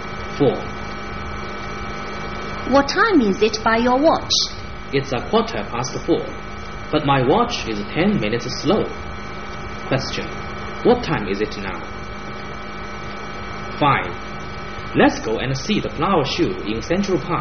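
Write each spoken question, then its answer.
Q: what time is it now?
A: 4:25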